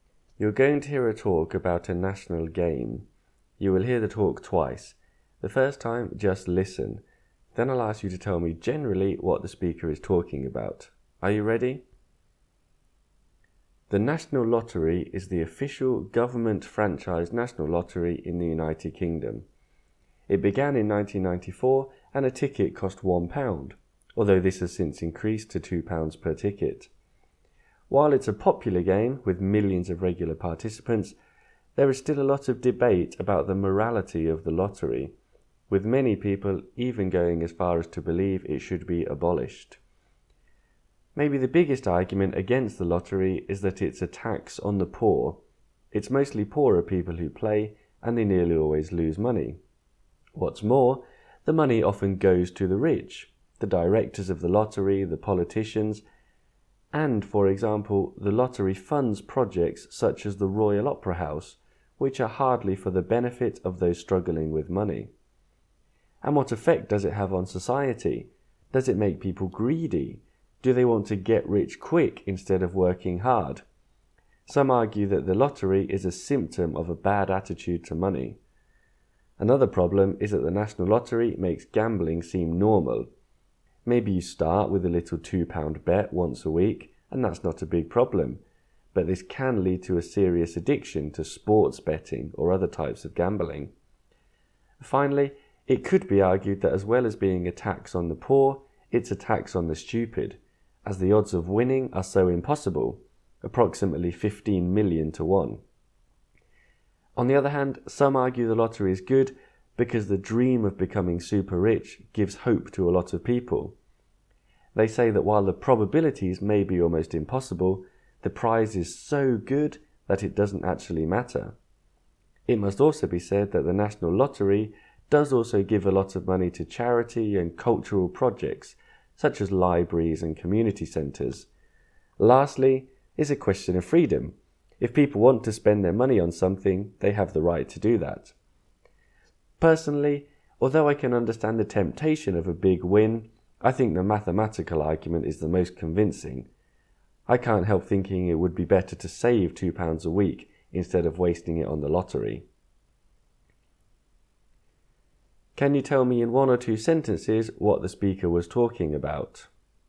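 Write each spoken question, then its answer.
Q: Can you tell me in one or two sentences what the speaker was talking about?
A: The speaker talks about the UK National Lottery and the arguments for and against it. In the end, the speaker thinks it is better to save the money than to play.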